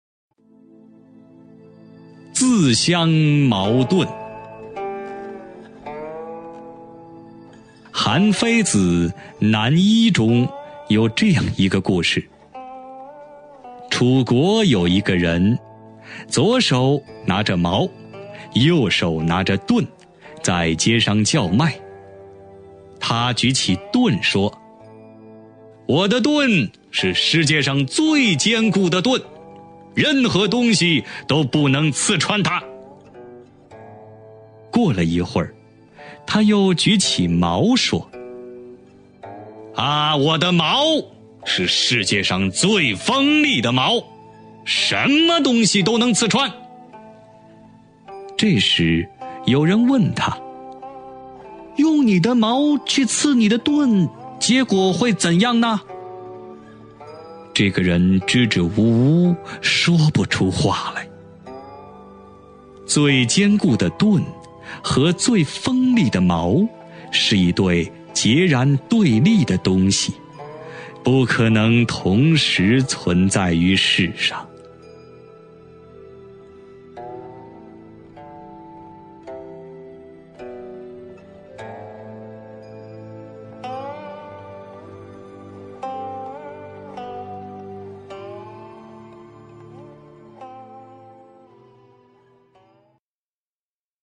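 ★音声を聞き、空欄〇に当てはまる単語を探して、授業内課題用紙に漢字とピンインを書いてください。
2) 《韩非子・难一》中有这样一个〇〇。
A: 故事

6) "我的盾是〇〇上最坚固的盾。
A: 世界

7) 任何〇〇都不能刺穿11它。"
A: 东西

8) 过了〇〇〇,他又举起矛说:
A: 一会儿

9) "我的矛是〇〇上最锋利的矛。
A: 世界

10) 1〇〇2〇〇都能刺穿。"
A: 什么 东西

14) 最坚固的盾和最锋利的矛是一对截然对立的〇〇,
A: 东西

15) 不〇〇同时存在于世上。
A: 可能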